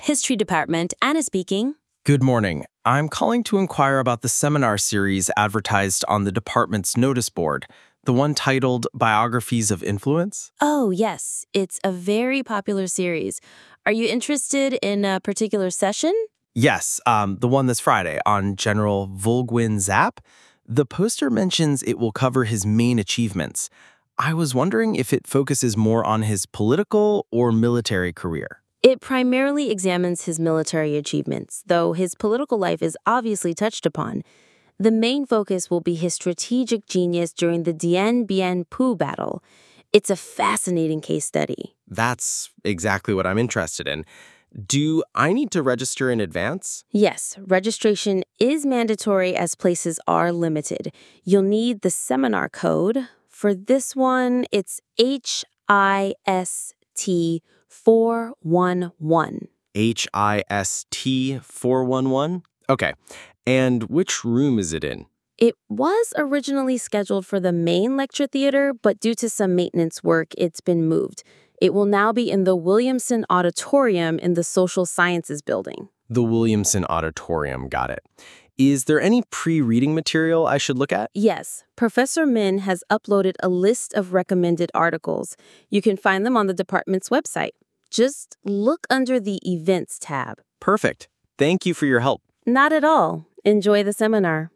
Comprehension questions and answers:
Complete the notes below. Write ONE WORD AND/OR A NUMBER for each answer.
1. • Topic: The life and (1) .................. of General Võ Nguyên Giáp.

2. • Main Focus: The Dien Bien Phu (2) ..................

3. • Seminar Code: (3) ..................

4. • Location: The (4) .................. Auditorium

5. • Reading list is available on the department's (5) ..................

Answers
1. achievements
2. battle
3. HIST411
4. Williamson
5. website

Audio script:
Admin: History Department, Anna speaking.
Student: Good morning. I'm calling to enquire about the seminar series advertised on the department's noticeboard. The one titled 'Biographies of Influence'.
Admin: Oh yes, it's a very popular series. Are you interested in a particular session?
Student: Yes, the one this Friday on General Võ Nguyên Giáp. The poster mentions it will cover his main (1) achievements. I was wondering if it focuses more on his political or military career?
Admin: It primarily examines his military achievements, though his political life is obviously touched upon. The main focus will be his strategic genius during the Dien Bien Phu (2) battle. It's a fascinating case study.
Student: That's exactly what I'm interested in. Do I need to register in advance?
Admin: Yes, registration is mandatory as places are limited. You'll need the seminar code. For this one, it's (3) HIST411.
Student: HIST411. Okay. And which room is it in?
Admin: It was originally scheduled for the main lecture theatre, but due to some maintenance work, it's been moved. It will now be in the (4) Williamson Auditorium in the Social Sciences building.
Student: The Williamson Auditorium. Got it. Is there any pre-reading material I should look at?
Admin: Yes, Professor Minh has uploaded a list of recommended articles. You can find them on the department's (5) website. Just look under the 'Events' tab.
Student: Perfect. Thank you for your help.
Admin: Not at all. Enjoy the seminar.

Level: B2